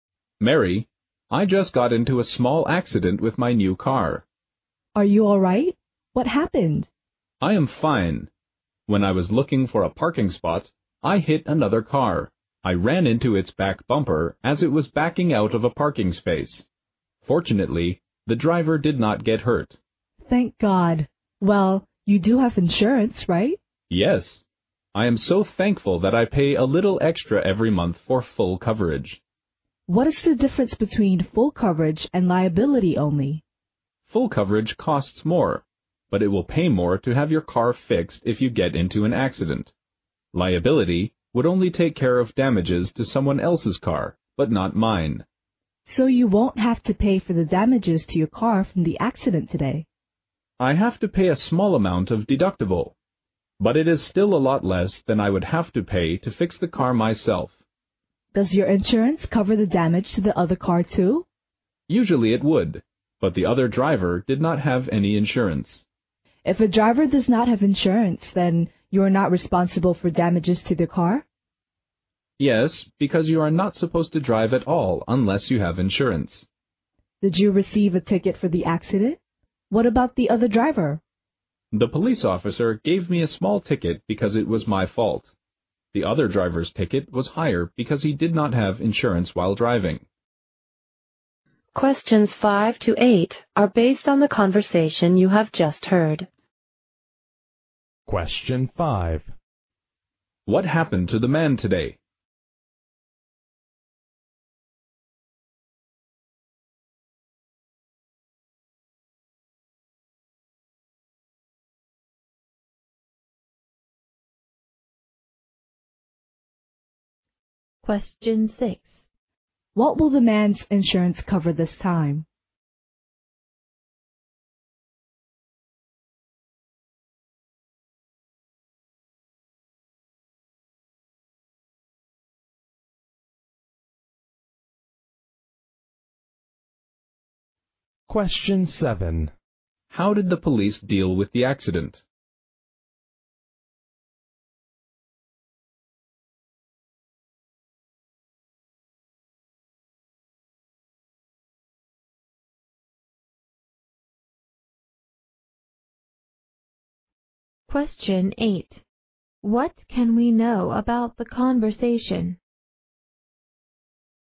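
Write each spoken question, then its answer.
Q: What happened to the man today?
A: He had a small car accident: he hit another car while looking for a parking spot.

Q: What will the man's insurance cover this time?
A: The damage to his own car, apart from a small deductible.

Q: How did the police deal with the accident?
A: Both drivers got tickets. The man's was small, and the other driver's was higher because he had no insurance.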